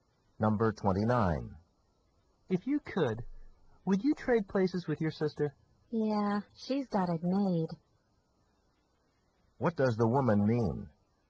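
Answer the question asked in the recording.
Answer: She would trade places; her sister has an easy life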